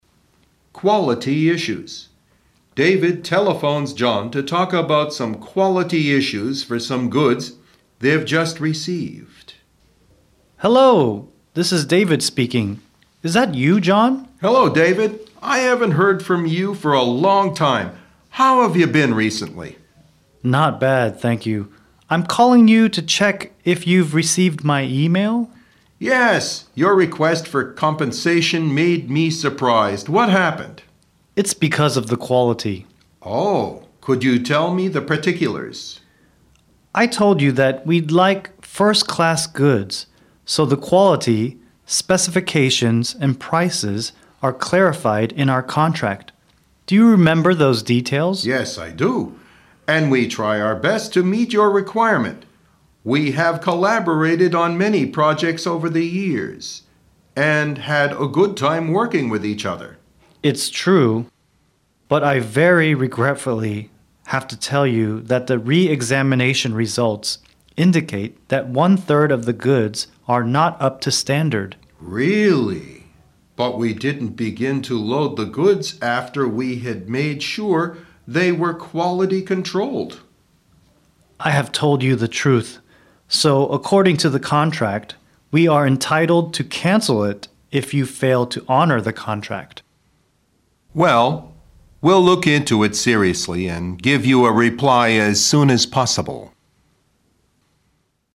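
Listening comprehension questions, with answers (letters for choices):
二、听力理解:请听下面的对话,根据对话内容从A、B、C三个选项中选出一个最佳选项。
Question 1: Why did David call John?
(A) He wanted to meet an old friend.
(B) He wanted to ask for compensation.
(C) He wanted to talk about a new contract.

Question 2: What's wrong with the goods which David has bought?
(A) They are not up to the standard.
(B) They are not loaded on time.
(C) They are not properly loaded.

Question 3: How did David prove that the goods have quality problems?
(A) He had them re-examined.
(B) He used them according to specifications.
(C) He looked into the contract.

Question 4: What can David do if the goods do not meet the requirements?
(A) Honor the contract.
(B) Cancel the contract.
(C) Load the goods.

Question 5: How did John face this complaint?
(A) He denied ( 否认) this problem.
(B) He didn't want to give a reply.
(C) He agreed to look into this problem seriously.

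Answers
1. B
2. A
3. A
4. B
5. C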